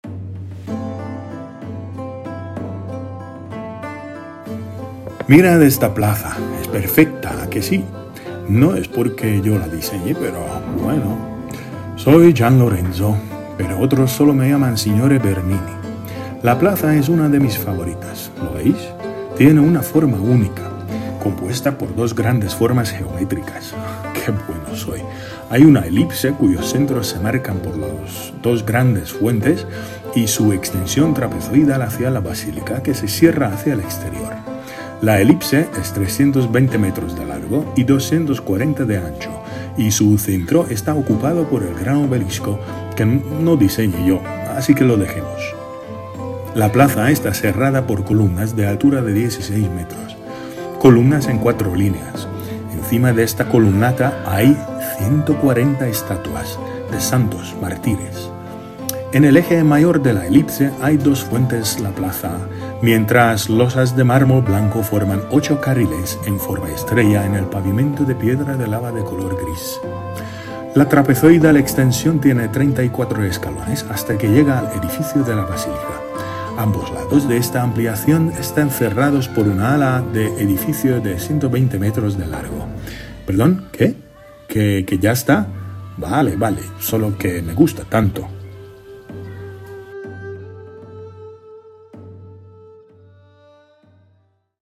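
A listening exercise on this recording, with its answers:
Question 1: ¿Quién diseñó la plaza de San Pedro?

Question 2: ¿Qué altura tienen las columnas alrededor de la plaza?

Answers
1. Gian Lorenzo Bernini
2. 16 metros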